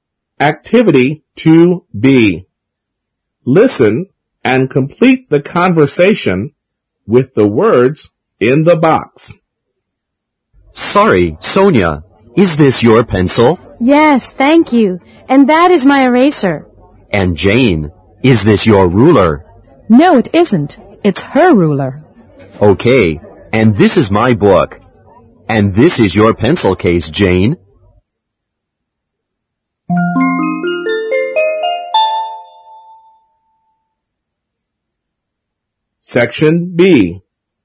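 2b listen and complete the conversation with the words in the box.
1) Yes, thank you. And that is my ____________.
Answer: eraser

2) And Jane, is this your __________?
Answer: ruler

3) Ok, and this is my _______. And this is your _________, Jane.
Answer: book; pencil case

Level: 六年级上册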